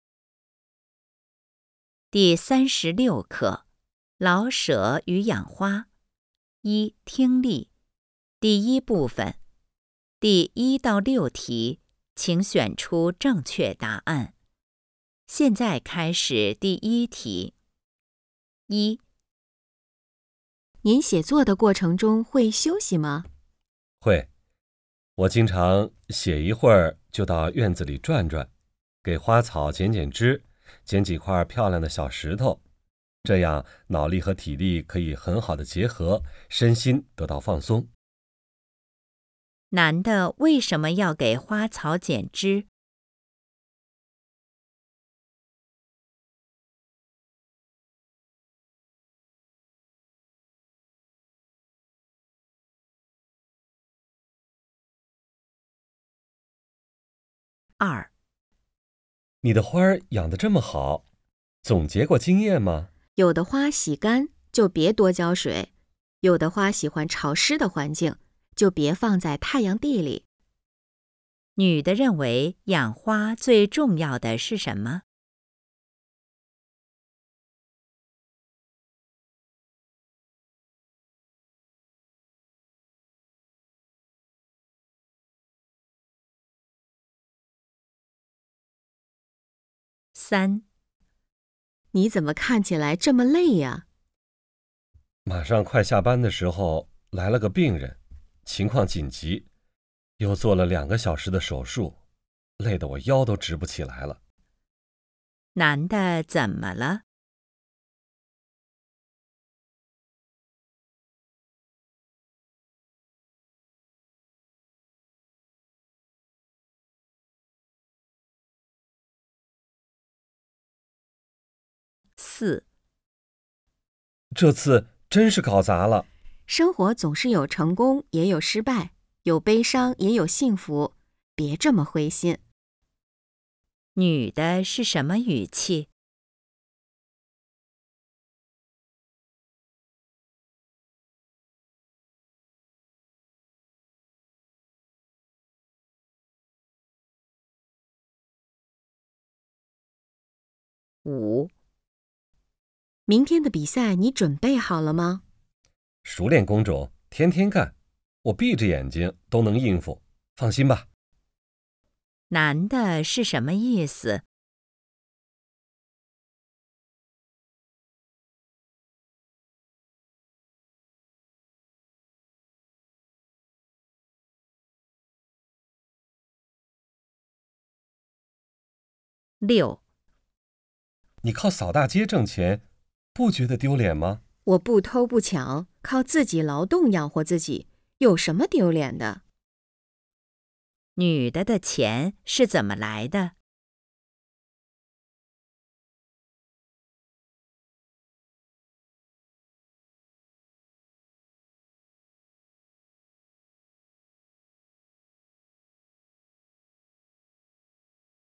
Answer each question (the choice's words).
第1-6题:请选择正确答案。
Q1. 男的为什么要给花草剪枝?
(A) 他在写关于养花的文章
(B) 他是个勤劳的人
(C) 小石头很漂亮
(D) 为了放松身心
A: 为了放松身心

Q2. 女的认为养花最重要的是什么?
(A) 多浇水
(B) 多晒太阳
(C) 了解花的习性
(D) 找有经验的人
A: 了解花的习性

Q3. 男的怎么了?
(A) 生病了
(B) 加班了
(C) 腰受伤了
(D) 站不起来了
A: 加班了

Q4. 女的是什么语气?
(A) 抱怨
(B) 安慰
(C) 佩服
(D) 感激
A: 安慰

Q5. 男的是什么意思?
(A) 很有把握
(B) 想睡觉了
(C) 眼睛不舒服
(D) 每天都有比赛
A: 很有把握

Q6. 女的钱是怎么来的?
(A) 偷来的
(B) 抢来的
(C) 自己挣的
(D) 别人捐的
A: 自己挣的

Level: HSK 5